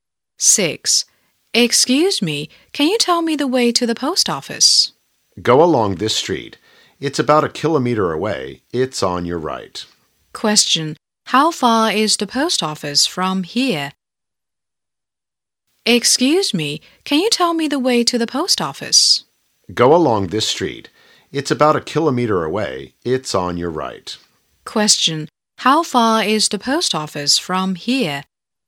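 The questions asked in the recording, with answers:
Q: How far is the post office from here?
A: About a kilometer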